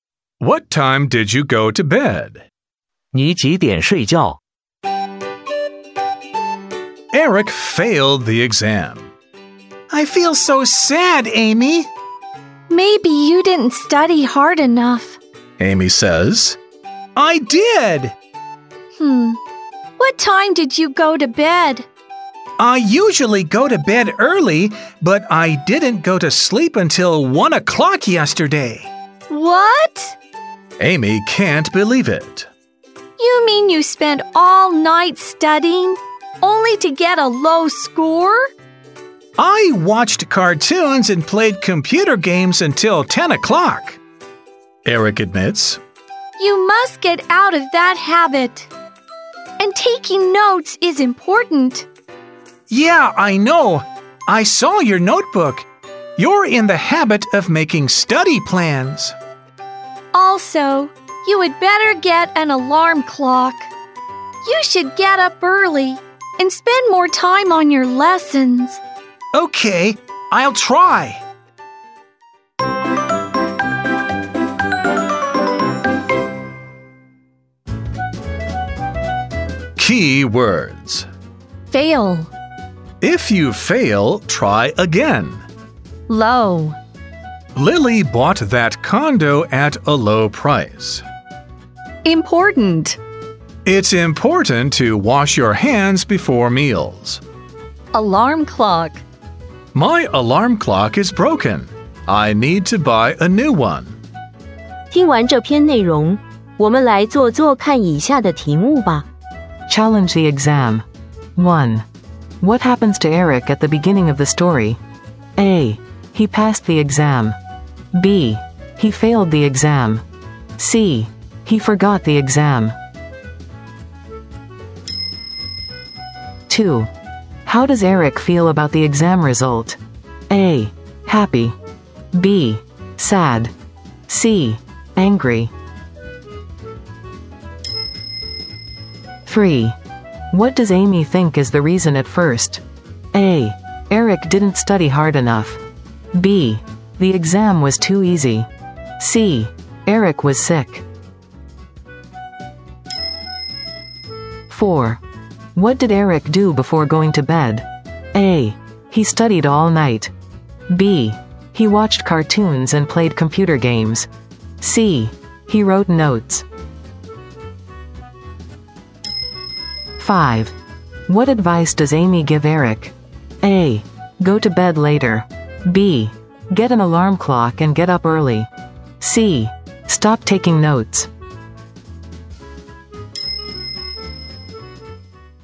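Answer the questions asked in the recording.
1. B: He failed the exam.
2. B: Sad.
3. A: Eric didn't study hard enough.
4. B: He watched cartoons and played computer games.
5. B: Get an alarm clock and get up early.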